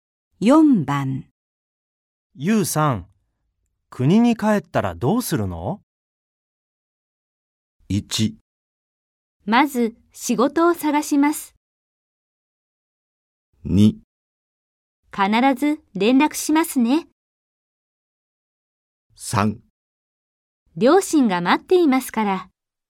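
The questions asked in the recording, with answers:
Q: ゆうさん、国に帰ったらどうするの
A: 1: まず仕事を探します。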